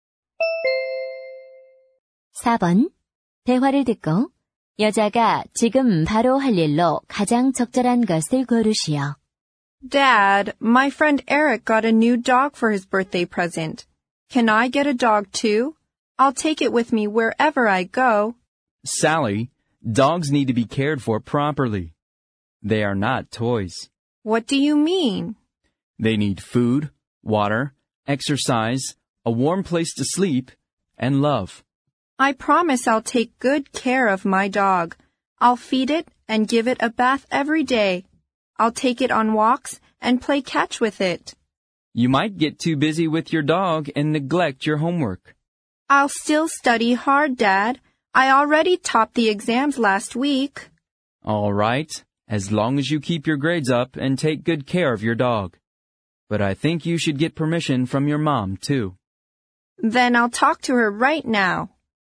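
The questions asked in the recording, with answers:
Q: 대화를 듣고 여자가 지금 바로 할 일로 가장 적절한 것을 고르시오.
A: 엄마에게 개를 키워도 되는지 허락받기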